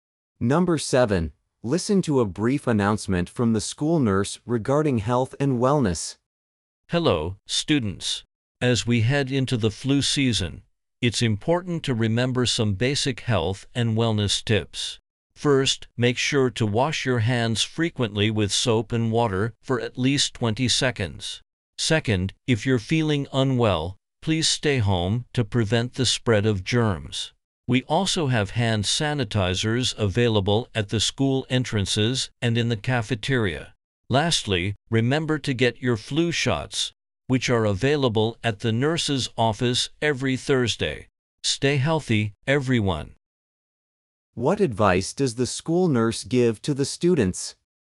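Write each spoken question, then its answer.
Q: What advice does the school nurse give to the students?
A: Wash hands often, stay home when sick, and get flu shots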